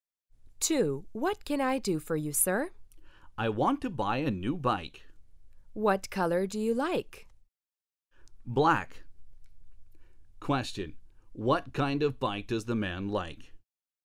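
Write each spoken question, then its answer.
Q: What kind of bike does the man like?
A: A black bike.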